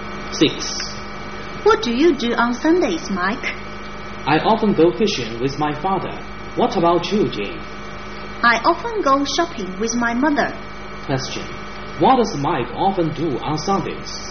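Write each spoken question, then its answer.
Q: What does Mike often do on Sundays?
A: He goes fishing with his father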